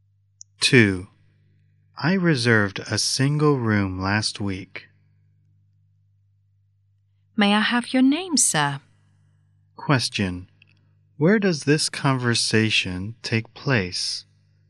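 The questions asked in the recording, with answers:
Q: Where does this conversation take place?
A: At a hotel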